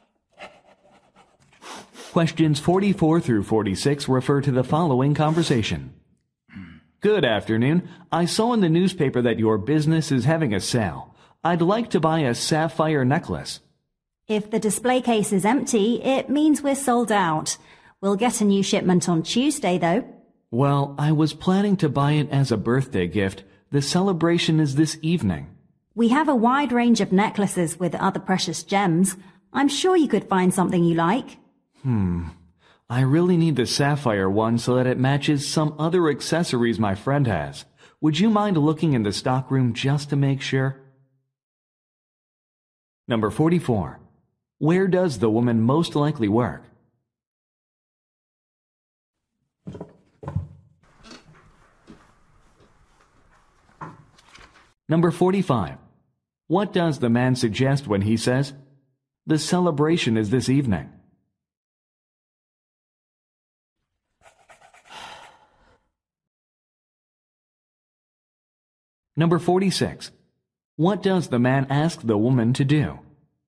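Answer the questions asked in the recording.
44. At a jewelry store
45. He can't wait until Tuesday for the new shipment
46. Check the stockroom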